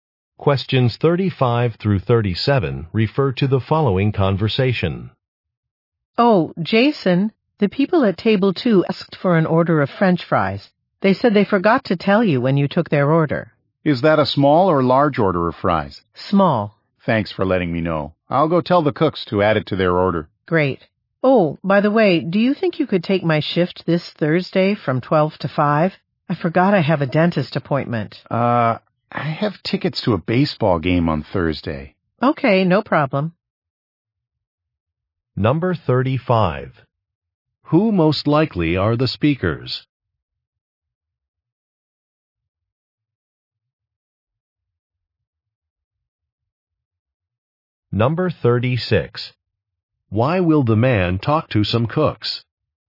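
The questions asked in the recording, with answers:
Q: Who most likely are the speakers?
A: Restaurant servers

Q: Why will the man talk to some cooks?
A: To add French fries to a table's order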